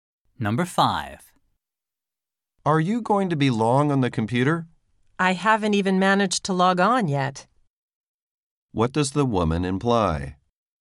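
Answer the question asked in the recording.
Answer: She has only just started and will be on the computer a while.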